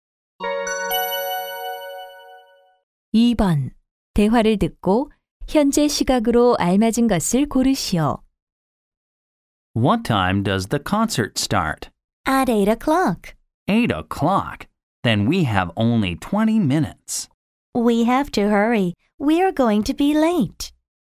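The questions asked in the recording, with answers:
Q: 대화를 듣고 현재 시각으로 알맞은 것을 고르시오.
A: 7시 40분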